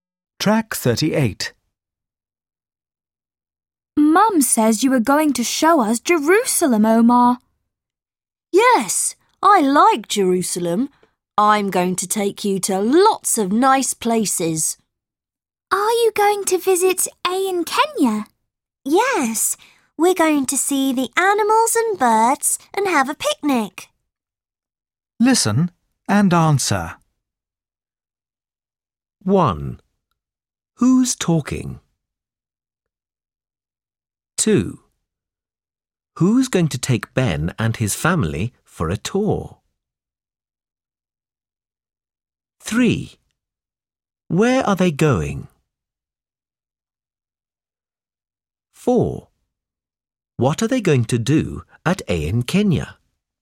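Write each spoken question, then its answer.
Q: Who's going to take Ben and his family for a tour?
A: Omar

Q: What are they going to do at AN Kenya?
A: See the animals and birds and have a picnic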